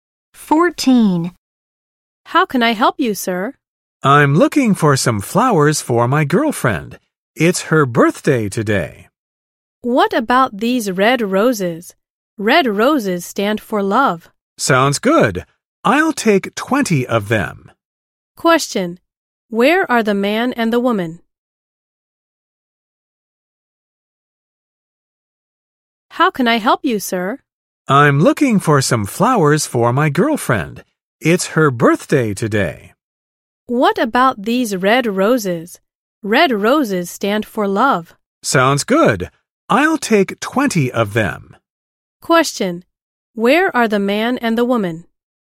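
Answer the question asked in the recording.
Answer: At a flower shop.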